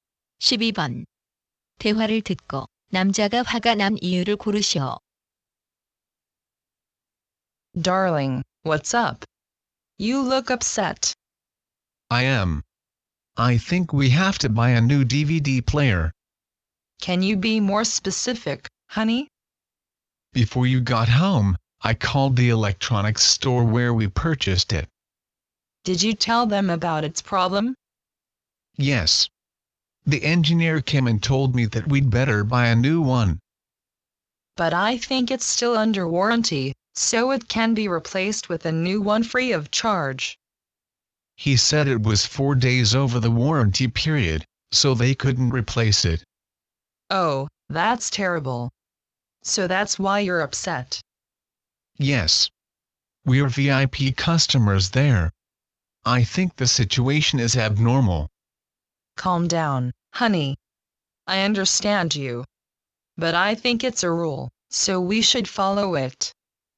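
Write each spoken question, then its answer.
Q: 대화를 듣고 남자가 화가 난 이유를 고르시오.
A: 보증 기간이 4일 지나 DVD 플레이어를 무상 교환받지 못해서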